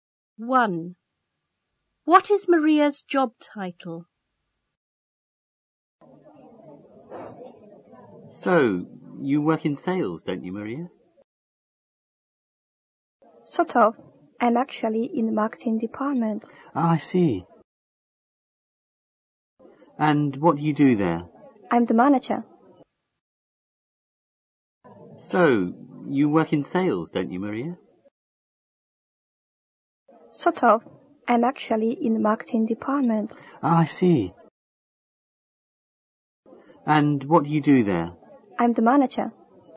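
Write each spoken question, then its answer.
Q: What is Maria's job title?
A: Marketing manager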